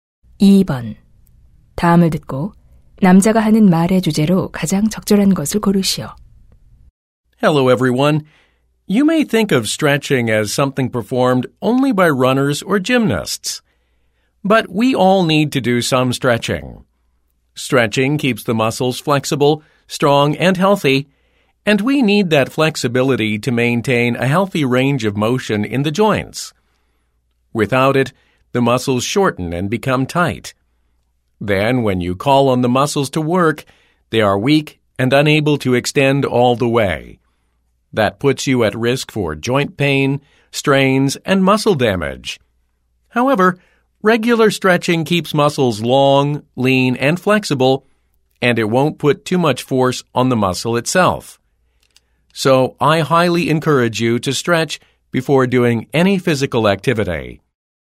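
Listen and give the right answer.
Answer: 규칙적인 스트레칭의 중요성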